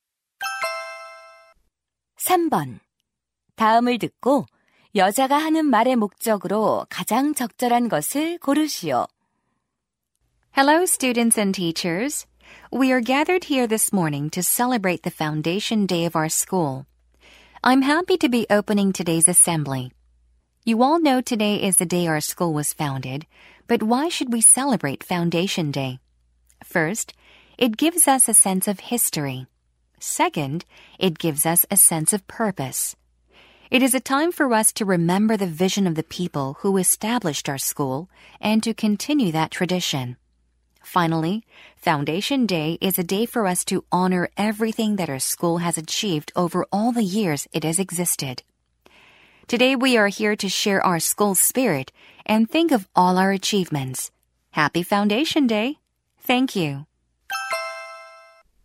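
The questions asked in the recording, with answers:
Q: 다음을 듣고 여자가 하는 말의 목적으로 가장 적절한 것을 고르시오.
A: 개교기념일을 축하하고 그 의미를 설명하려고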